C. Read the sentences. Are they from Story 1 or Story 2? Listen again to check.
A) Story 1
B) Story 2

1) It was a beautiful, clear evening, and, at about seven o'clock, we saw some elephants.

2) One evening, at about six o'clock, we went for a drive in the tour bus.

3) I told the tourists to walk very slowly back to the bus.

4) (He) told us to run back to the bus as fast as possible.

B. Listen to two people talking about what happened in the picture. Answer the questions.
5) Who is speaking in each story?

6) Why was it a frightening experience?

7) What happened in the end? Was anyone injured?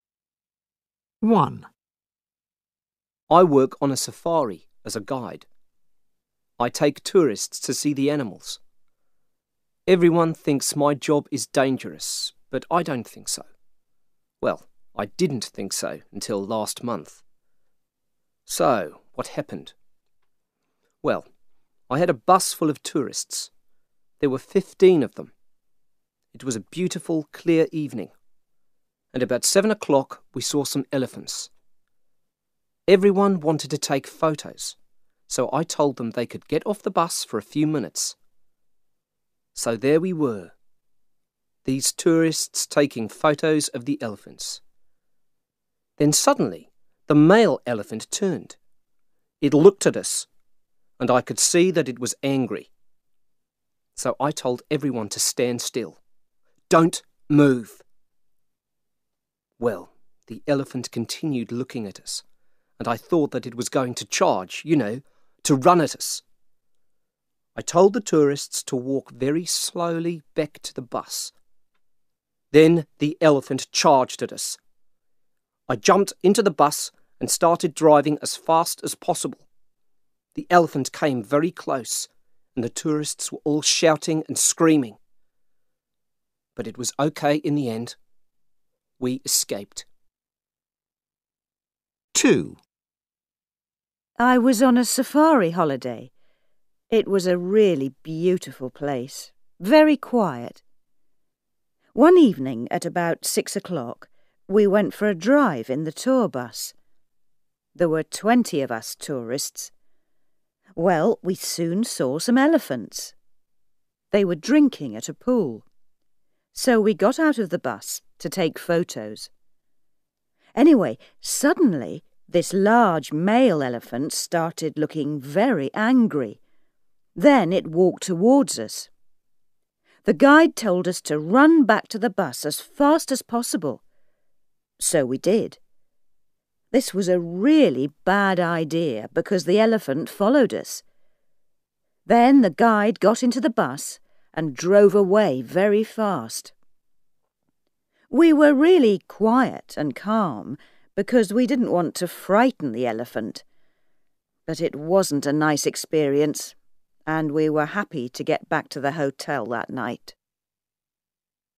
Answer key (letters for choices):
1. A
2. B
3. A
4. B
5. Story 1: a safari guide
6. Because an elephant charged at them.
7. They escaped in the bus. No one was injured.

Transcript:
I take tourists to see the animals. Everyone thinks my job is dangerous, but I don't think so. Well, I didn't think so until last month. So, what happened? Well, I had a bus full of tourists. There were fifteen of them. Everyone wanted to take photos, so I told them they could get off the bus for a few minutes. So there we were, these tourists taking photos of the elephants. Then suddenly, the male elephant turned. It looked at us. And I could see that it was angry. So I told everyone to stand still. "Don't move!" Well, the elephant continued looking at us, and I thought that it was going to charge, you know, to run at us. Then the elephant charged at us. I jumped into the bus and started driving as fast as possible. The elephant came very close, and the tourists were all shouting and screaming. But it was OK in the end. We escaped.
I was on a safari holiday. It was a really beautiful place, very quiet. There were twenty of us tourists. Well, we soon saw some elephants. They were drinking at a pool. So we got out of the bus to take photos. Anyway, suddenly, this large male elephant started looking very angry. Then it walked towards us. The guide told us to run back to the bus as fast as possible. So we did. This was a really bad idea because the elephant followed us. Then the guide got into the bus and drove away very fast. We were really quiet and calm because we didn't want to frighten the elephant. But it wasn't a nice experience, and we were happy to get back to the hotel that night.